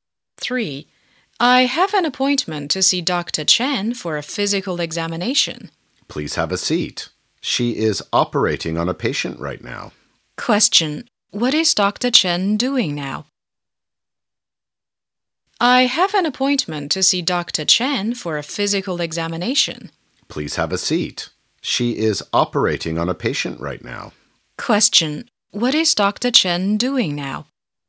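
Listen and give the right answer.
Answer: Operating on a patient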